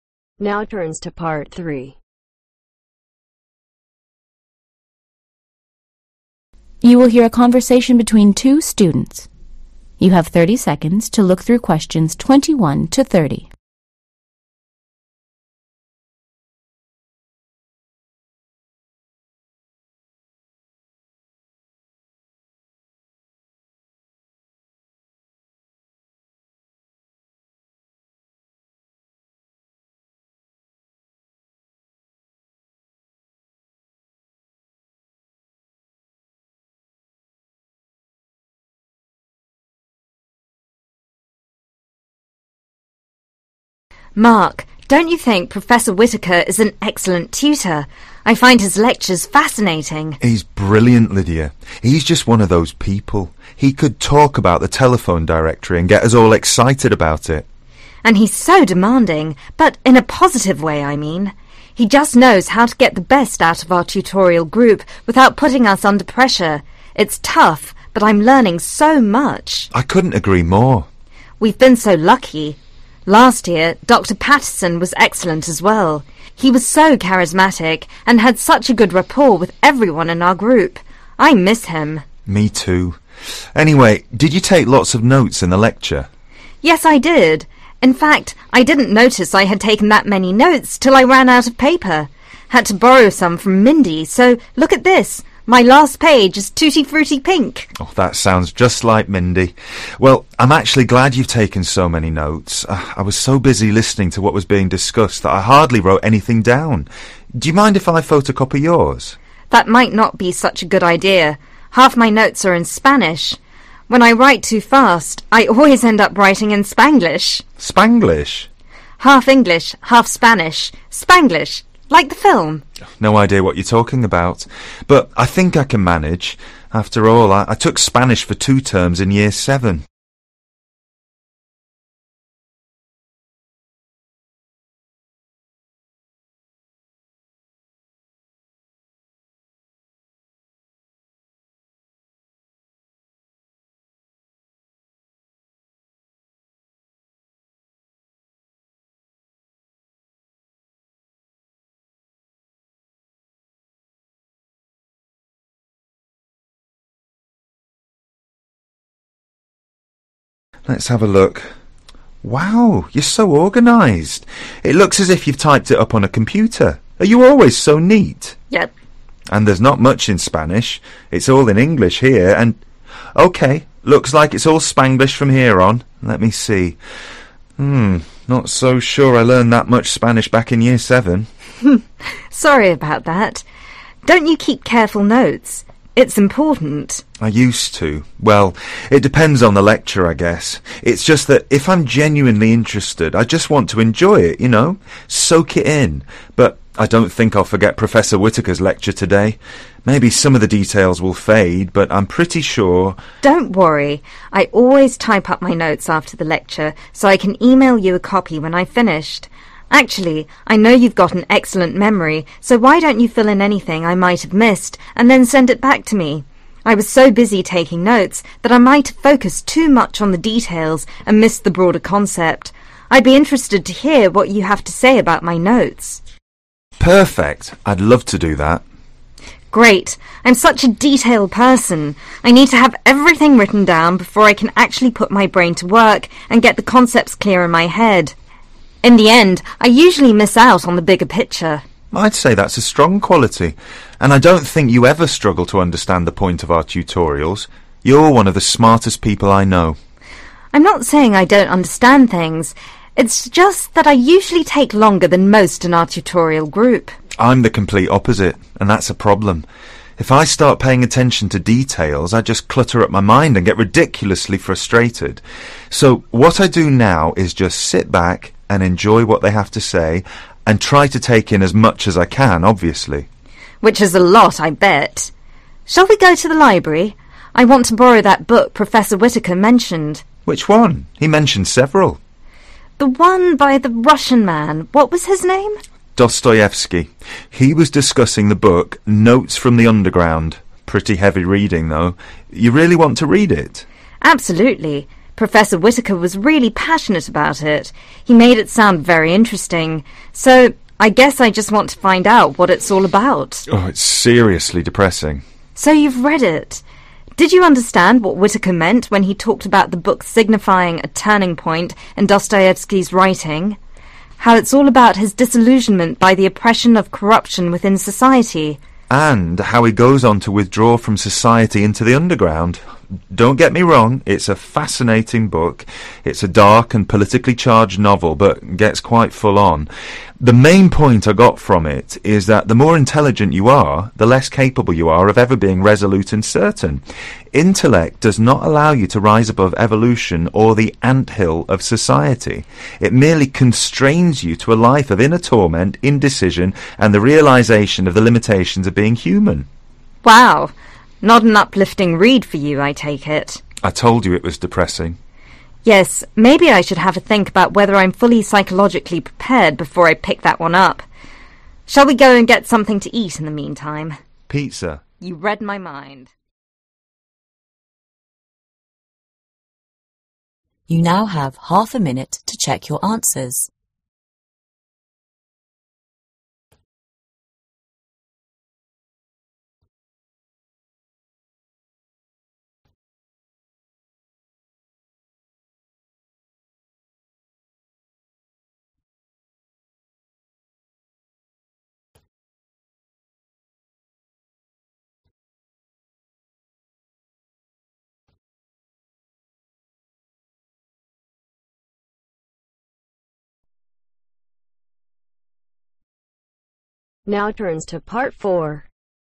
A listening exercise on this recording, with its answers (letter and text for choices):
choose the correct letter A-D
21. Mark tells Lydia that he feels professor Whitaker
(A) is able to inspire his class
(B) never gives fascinating lectures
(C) is not available as often as he would like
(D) is under a lot of pressure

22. Lydia says Dr Pattinson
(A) was her tutor the term before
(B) is more charismatic than Professor Whitaker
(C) had a good report with her group last year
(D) misses her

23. In the lecture, Lydia took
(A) more notes than she thought she had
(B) fewer notes than she thought she had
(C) far too many notes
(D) fewer notes than mark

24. Mark wants to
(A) discuss his notes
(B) listen to what Mindy has to say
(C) photocopy Lydia's notes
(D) take some more notes on the lecture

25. Lydia says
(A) Mark writes too fast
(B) her notes are all in spanish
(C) that going to the lecture wasn't such a good idea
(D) she used two different languages in her notes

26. What will Lydia do with her notes once she's typed them up ?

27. What does Lydia think she usually fails to understand ?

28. How does Mark feel if he pays too much attention to detail ?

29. What's the name of the book they talk about ?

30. Mark says that the book is about the limitations of what ?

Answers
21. (A) is able to inspire his class
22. (C) had a good report with her group last year
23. (A) more notes than she thought she had
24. (C) photocopy Lydia's notes
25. (D) she used two different languages in her notes
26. Email Mark a copy/email him a copy
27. The bigger picture
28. (He feels) (ridiculously) frustrated
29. Notes from (the) underground
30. being human